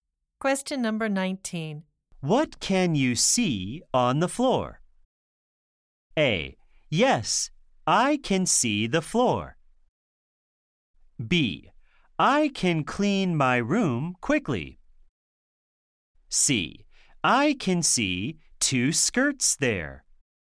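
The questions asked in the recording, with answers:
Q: What can you see on the floor?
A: C: I can see two skirts there.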